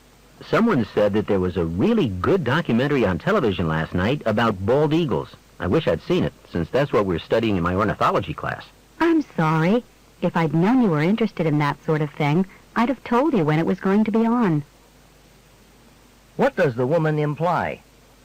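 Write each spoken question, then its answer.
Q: What does the woman imply?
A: She knew about the documentary but didn't know the man was interested in it.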